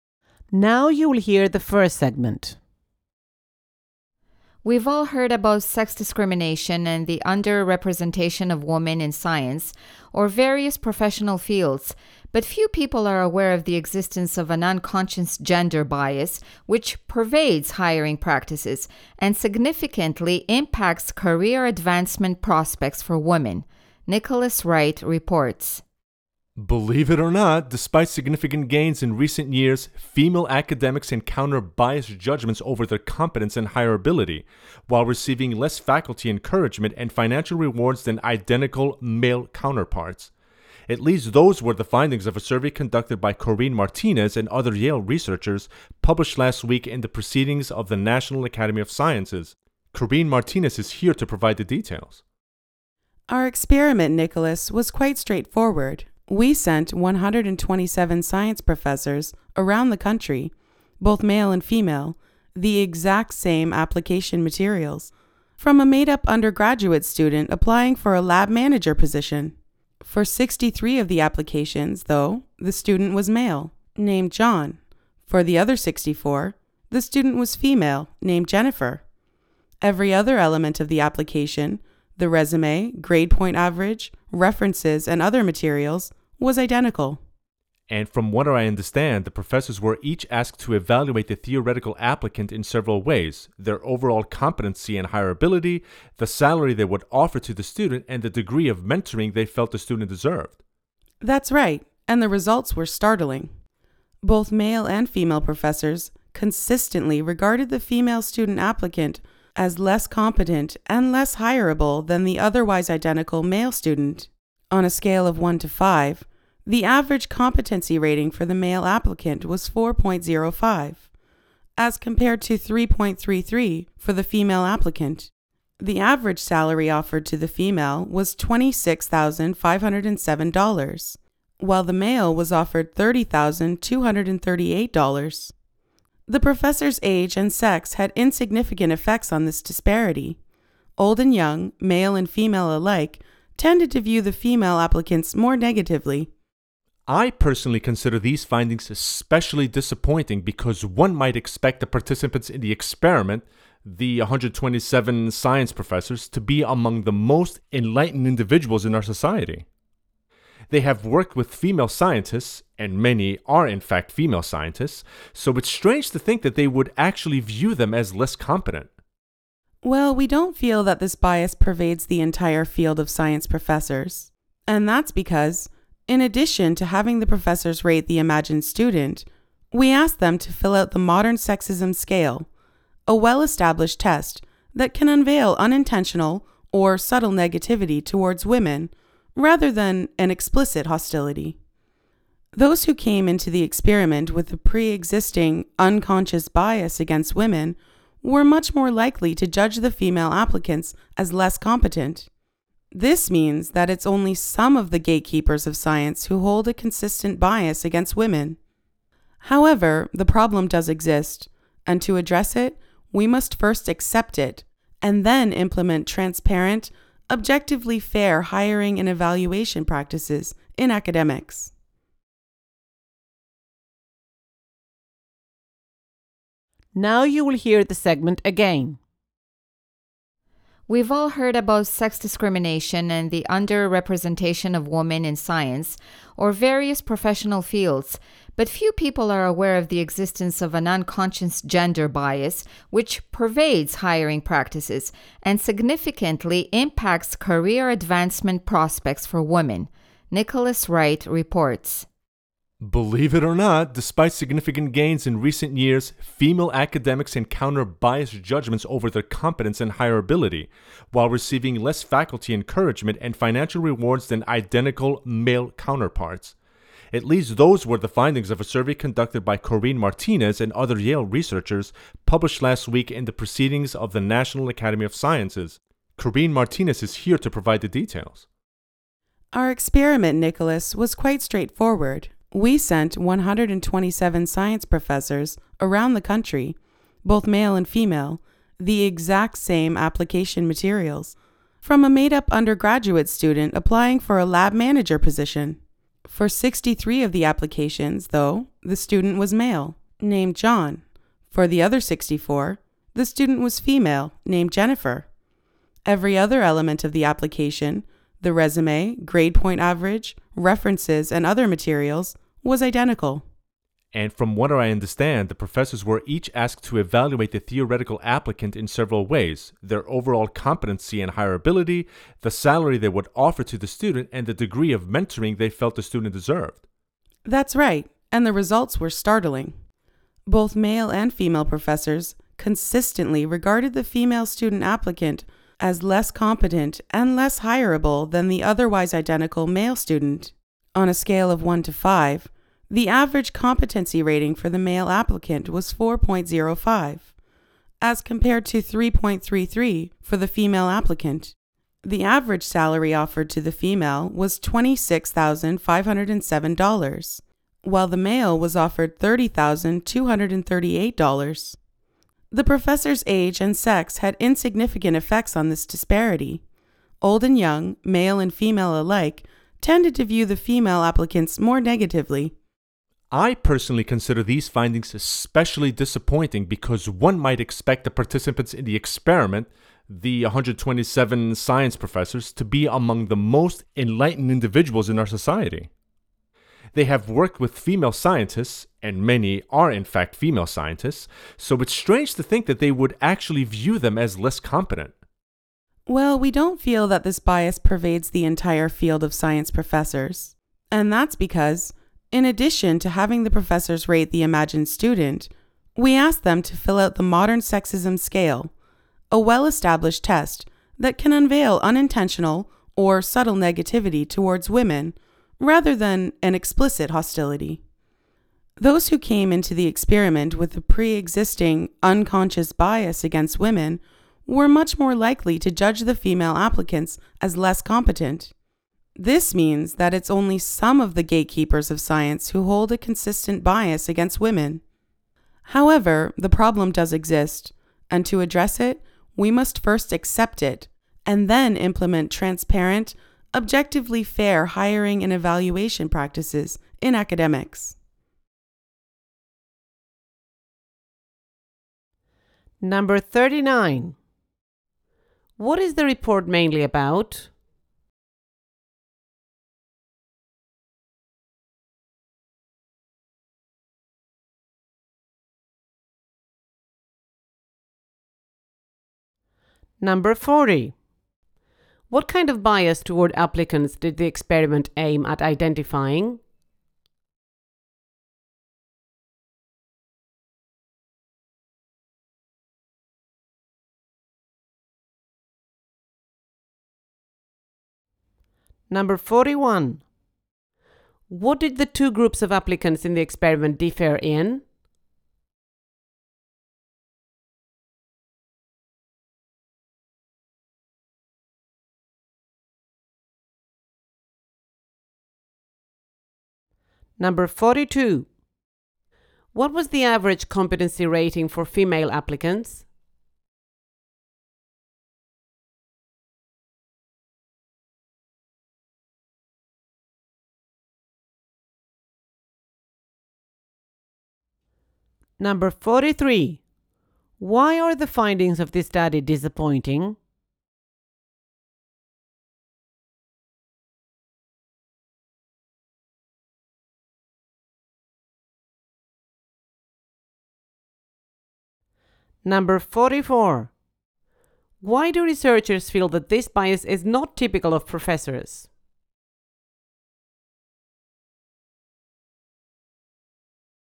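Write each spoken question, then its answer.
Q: What is the report mainly about?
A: Unconscious gender bias against women in academic science hiring

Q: What kind of bias toward applicants did the experiment aim at identifying?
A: Unconscious or subtle gender bias against female applicants

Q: What did the two groups of applicants in the experiment differ in?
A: Only the applicant's gender (name: John or Jennifer)

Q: What was the average competency rating for female applicants?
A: 3.33 out of 5

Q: Why are the findings of this study disappointing?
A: The professors were expected to be among the most enlightened people, and many work with or are female scientists

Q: Why do researchers feel that this bias is not typical of professors?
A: The Modern Sexism Scale showed that only professors with a pre-existing unconscious bias rated women as less competent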